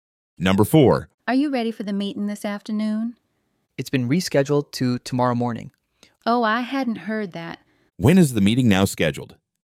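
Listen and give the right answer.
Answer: Tomorrow morning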